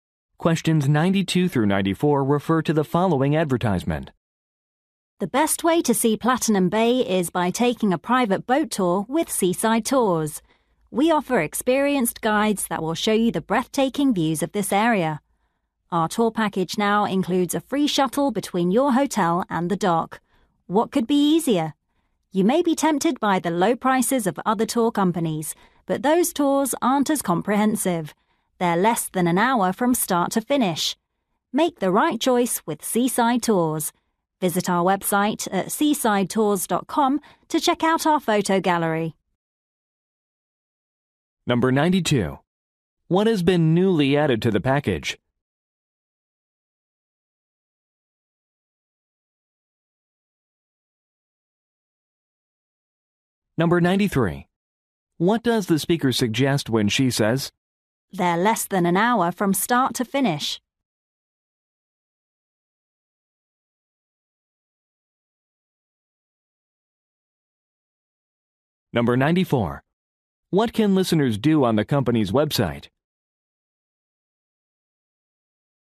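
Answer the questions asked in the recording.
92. A free shuttle between the hotel and the dock
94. View a photo gallery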